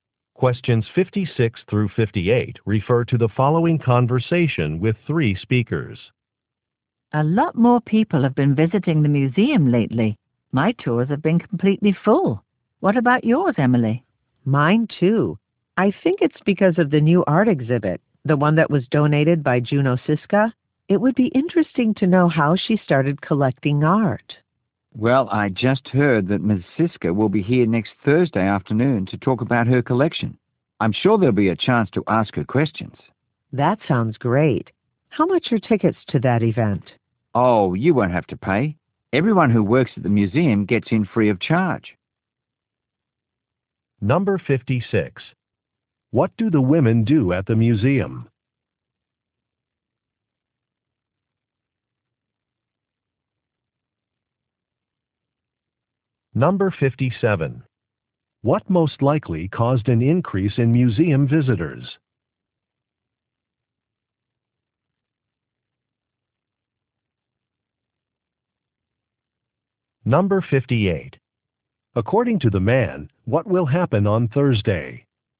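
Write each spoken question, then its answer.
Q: What do the women do at the museum?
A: They lead tours

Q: What most likely caused an increase in museum visitors?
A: A new art exhibit

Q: According to the man, what will happen on Thursday?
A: The art collector Juno Siska will give a talk about her collection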